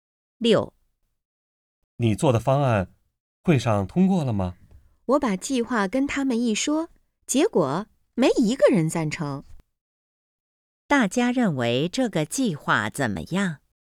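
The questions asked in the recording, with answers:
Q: 大家认为这个计划怎么样?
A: 都不赞成这个计划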